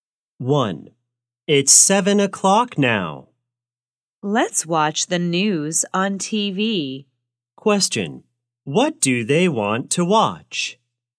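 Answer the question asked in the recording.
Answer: the news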